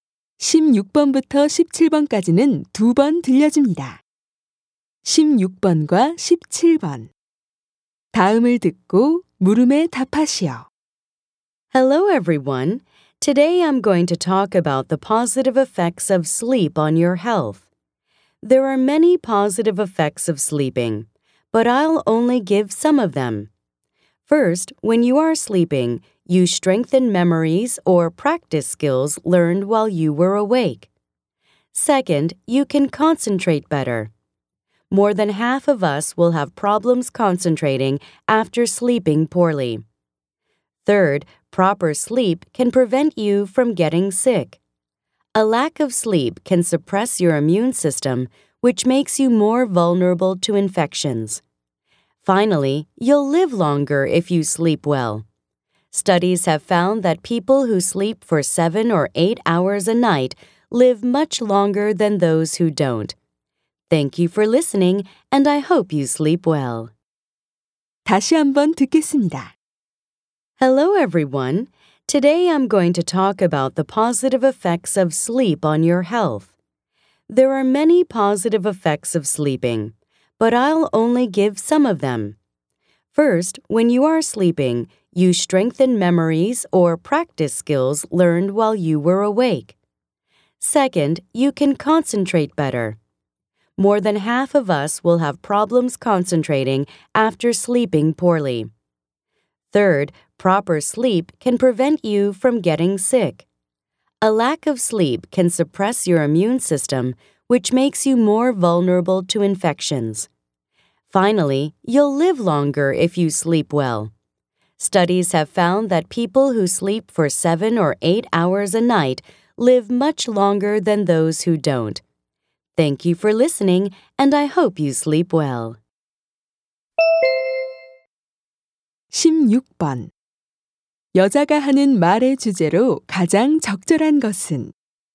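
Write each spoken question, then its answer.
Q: 여자가 하는 말의 주제로 가장 적절한 것은?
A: 수면이 건강에 미치는 긍정적인 효과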